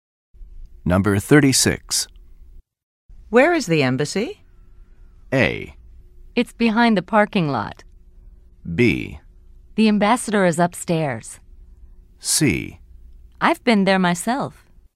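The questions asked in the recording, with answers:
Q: Where is the embassy?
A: A: It's behind the parking lot.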